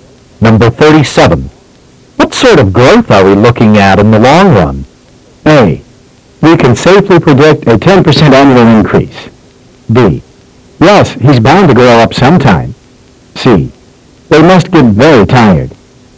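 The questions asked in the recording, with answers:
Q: What sort of growth are we looking at in the long run?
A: A: We can safely predict a 10% annual increase.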